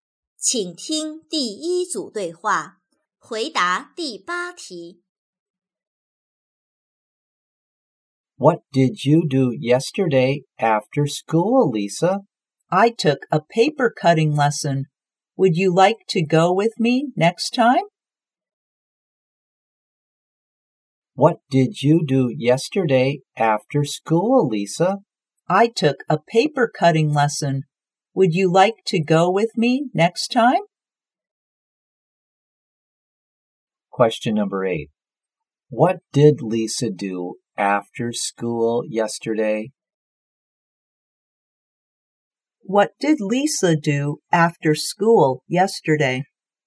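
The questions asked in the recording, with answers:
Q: What did Lisa do after school yesterday?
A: She took a paper cutting lesson.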